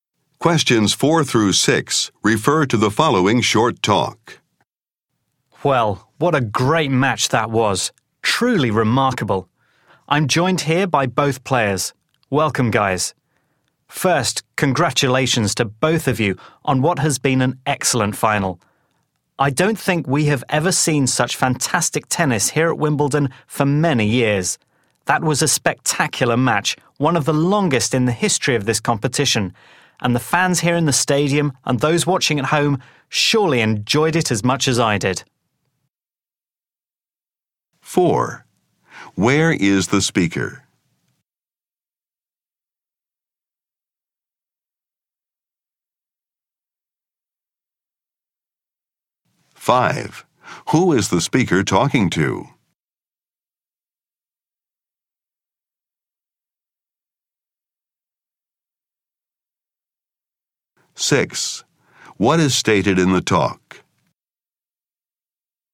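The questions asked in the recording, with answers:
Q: Where is the speaker?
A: At Wimbledon, at a tennis match

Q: Who is the speaker talking to?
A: The two tennis players in the final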